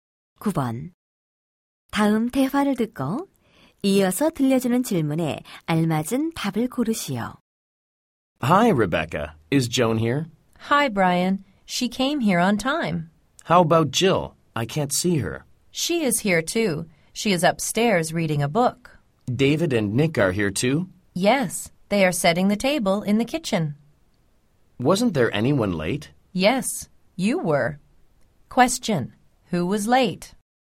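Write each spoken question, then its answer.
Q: Who was late?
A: Brian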